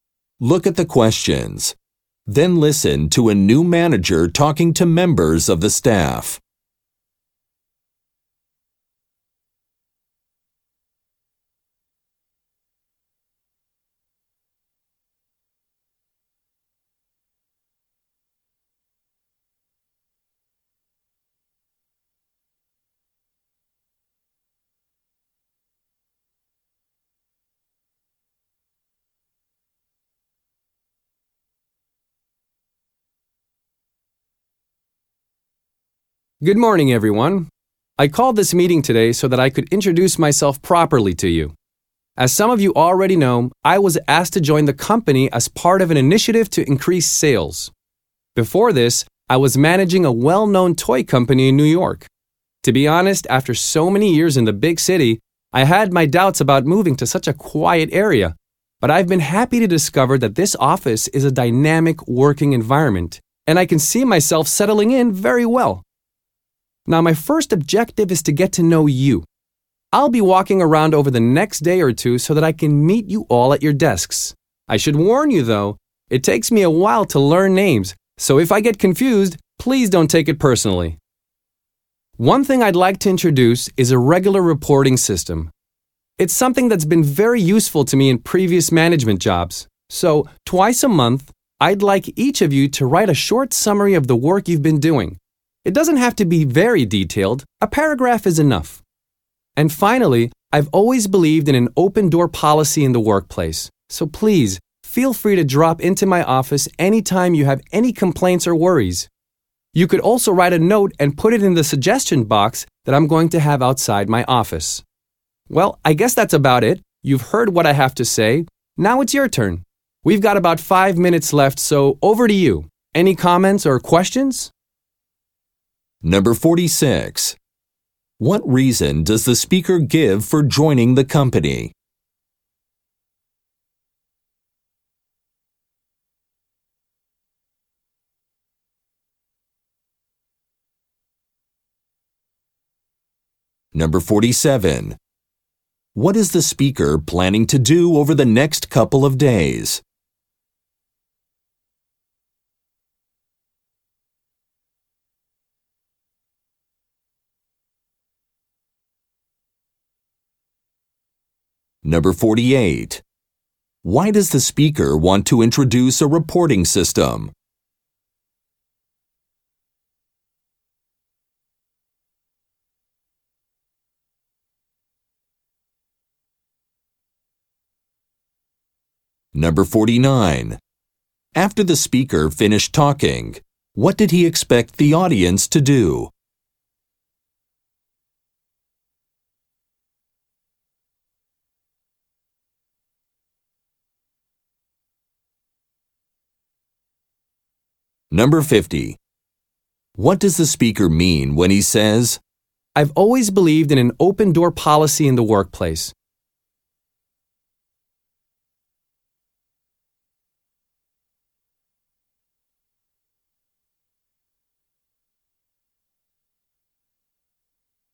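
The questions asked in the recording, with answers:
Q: What reason does the speaker give for joining the company?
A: To help increase sales

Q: What is the speaker planning to do over the next couple of days?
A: Meet staff at their desks

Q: Why does the speaker want to introduce a reporting system?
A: It was useful in his previous jobs

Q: After the speaker finished talking, what did he expect the audience to do?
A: Ask questions or make comments

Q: "I've always believed in an open door policy in the workplace.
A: Staff can come to him anytime with concerns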